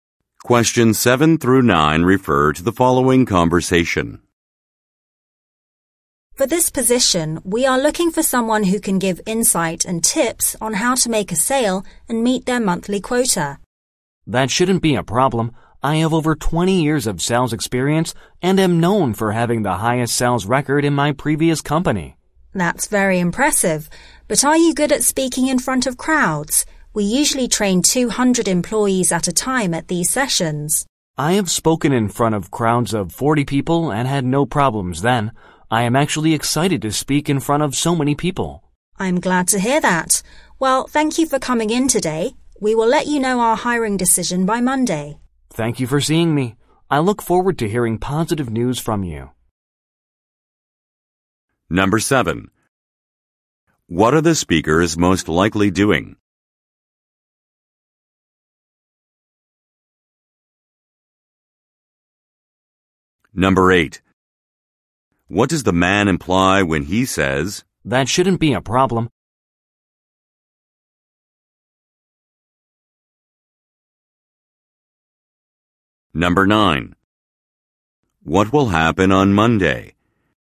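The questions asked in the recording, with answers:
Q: What are the speakers most likely doing?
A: Having a job interview

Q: What will happen on Monday?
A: The hiring decision will be announced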